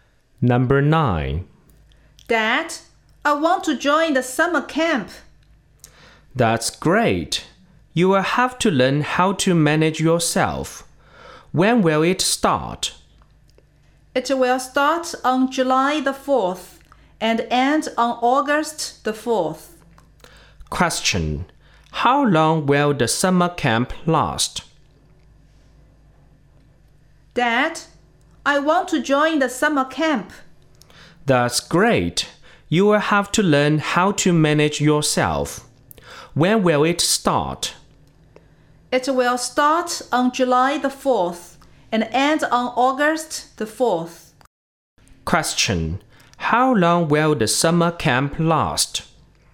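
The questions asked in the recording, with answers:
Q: How long will the summer camp last?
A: One month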